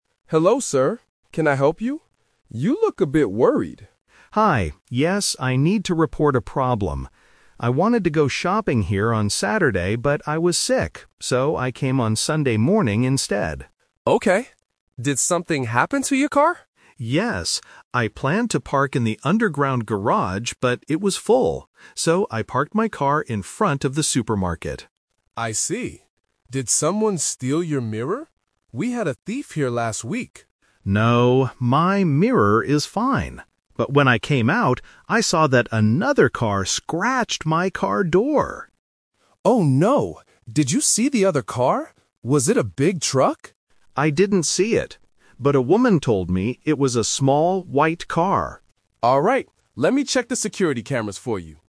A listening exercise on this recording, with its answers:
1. When did the driver go to the supermarket?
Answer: On Sunday morning.

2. Where did the driver park his car?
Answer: In front of the supermarket.

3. What was the problem with the driver's car?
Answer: The door was scratched.

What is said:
Security Guard: Hello, sir. Can I help you? You look a bit worried.
Driver: Hi. Yes, I need to report a problem. I wanted to go shopping here on Saturday, but I was sick. So, I came on Sunday morning instead.
Security Guard: Okay. Did something happen to your car?
Driver: Yes. I planned to park in the underground garage, but it was full. So, I parked my car in front of the supermarket.
Security Guard: I see. Did someone steal your mirror? We had a thief here last week.
Driver: No, my mirror is fine. But when I came out, I saw that another car scratched my car door!
Security Guard: Oh no. Did you see the other car? Was it a big truck?
Driver: I didn't see it. But a woman told me it was a small white car.
Security Guard: Alright. Let me check the security cameras for you.